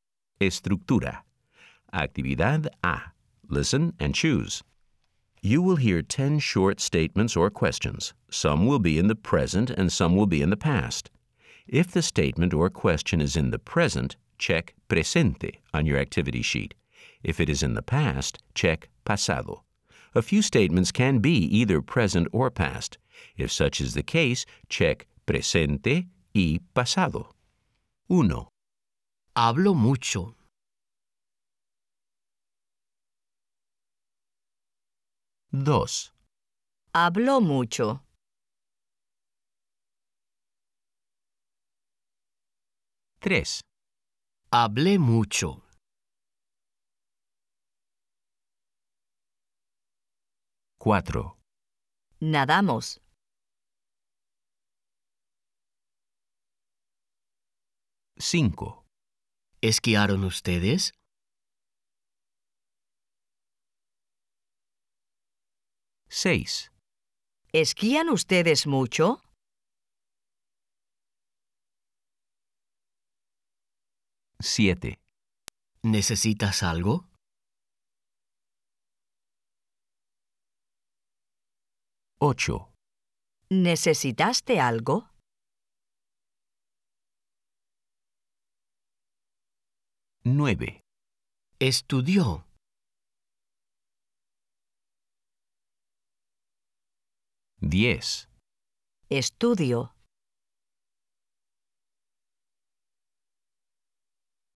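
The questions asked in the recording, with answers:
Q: Hablé mucho.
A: pasado

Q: Nadamos.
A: presente y pasado

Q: ¿Esquiaron ustedes?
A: pasado

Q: ¿Esquían ustedes mucho?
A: presente

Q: ¿Necesitas algo?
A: presente

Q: ¿Necesitaste algo?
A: pasado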